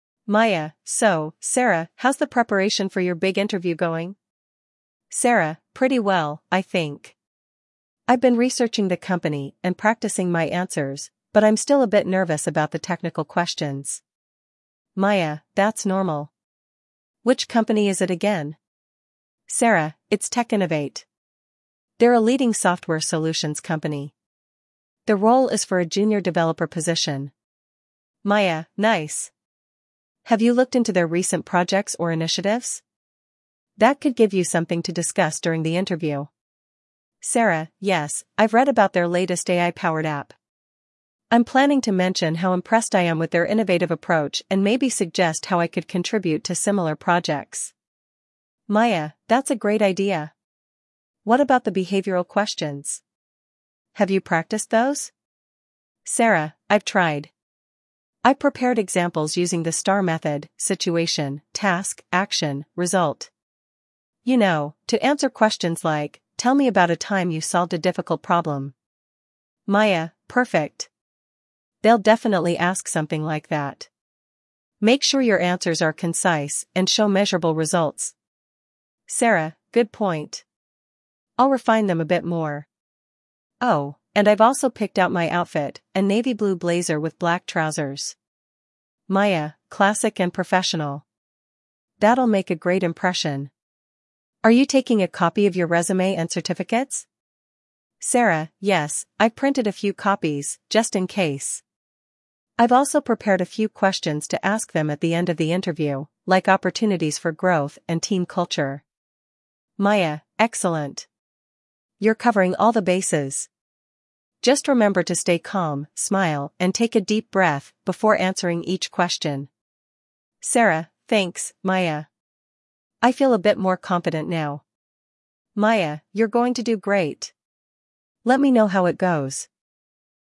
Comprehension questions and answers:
Part 2: Fill in the Blanks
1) Sarah is applying for a __________ position at TechInnovate.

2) Maya suggests discussing the company's __________ during the interview.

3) Sarah has chosen a __________ blazer and black trousers for the interview.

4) At the end of the interview, Sarah plans to ask about __________ and __________.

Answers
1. junior developer
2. AI-powered app
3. navy-blue
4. opportunities for growth; team culture

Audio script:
Maya: So, Sarah, how's the preparation for your big interview going?
Sarah: Pretty well, I think. I've been researching the company and practicing my answers, but I'm still a bit nervous about the technical questions.
Maya: That's normal. Which company is it again?
They're a leading software solutions company. The role is for a junior developer position.
Maya: Nice! Have you looked into their recent projects or initiatives? That could give you something to discuss during the interview.
Sarah: Yes, I've read about their latest AI-powered app. I'm planning to mention how impressed I am with their innovative approach and maybe suggest how I could contribute to similar projects.
Maya: That's a great idea! What about the behavioral questions? Have you practiced those?
Sarah: I've tried. I've prepared examples using the STAR method—situation, task, action, result. You know, to answer questions like, "Tell me about a time you solved a difficult problem."
Maya: Perfect! They'll definitely ask something like that. Make sure your answers are concise and show measurable results.
Sarah: Good point. I'll refine them a bit more. Oh, and I've also picked out my outfit—a navy-blue blazer with black trousers.
Maya: Classic and professional. That'll make a great impression. Are you taking a copy of your resume and certificates?
Sarah: Yes, I've printed a few copies, just in case. I've also prepared a few questions to ask them at the end of the interview, like opportunities for growth and team culture.
Maya: Excellent! You're covering all the bases. Just remember to stay calm, smile, and take a deep breath before answering each question.
Sarah: Thanks, Maya. I feel a bit more confident now.
Maya: You're going to do great! Let me know how it goes.
Questions